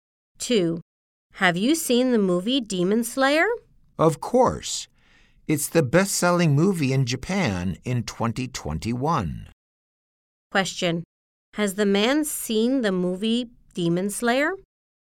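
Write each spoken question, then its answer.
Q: Question. Has the man seen the movie Demon Slayer?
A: Yes, he has.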